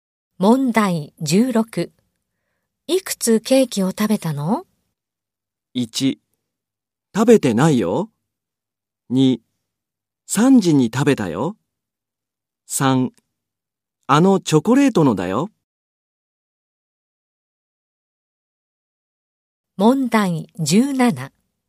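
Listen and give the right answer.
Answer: 1: 食べてないよ。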